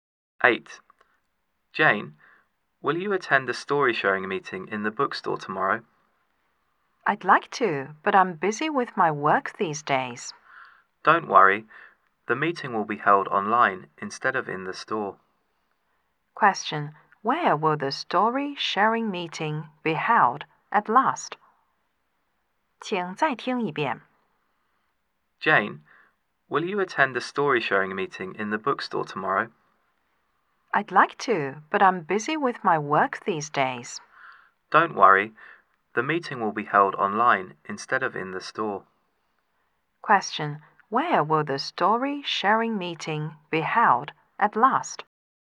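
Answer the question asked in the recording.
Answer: Online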